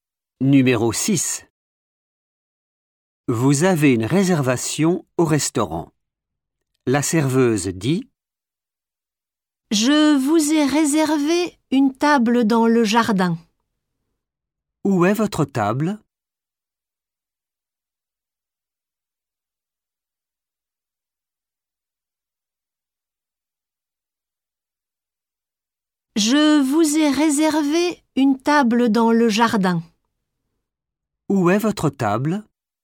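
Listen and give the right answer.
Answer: dans le jardin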